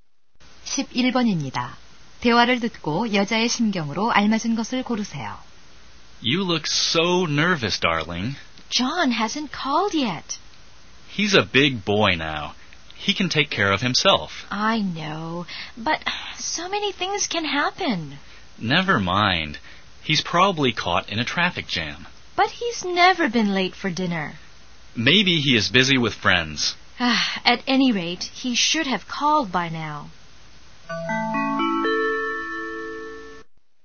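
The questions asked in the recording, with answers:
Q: 대화를 듣고 여자의 심경으로 알맞은 것을 고르세요.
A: 걱정스러움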